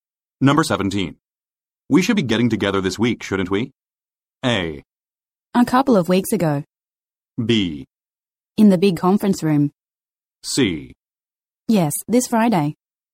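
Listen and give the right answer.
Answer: C: Yes, this Friday.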